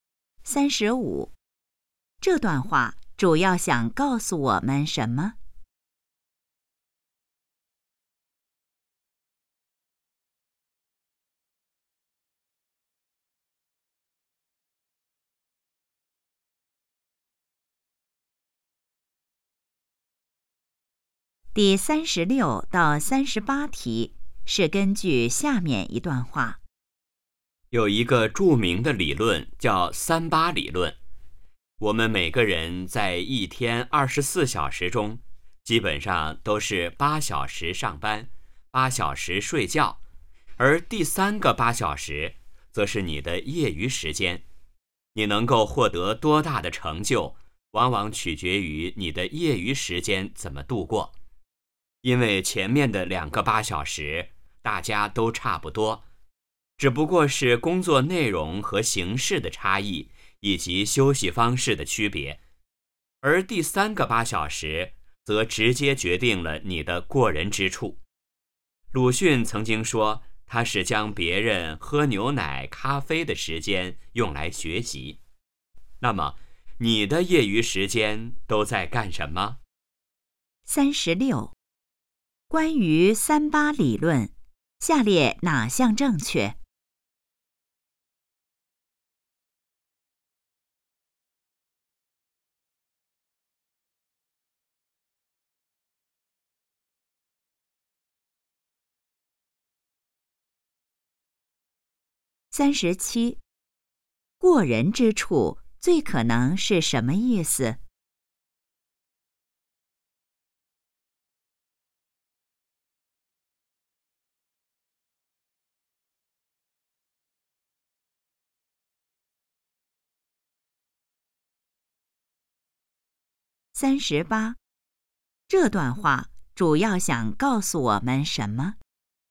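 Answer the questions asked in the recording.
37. 比别人强的地方
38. 要利用好业余时间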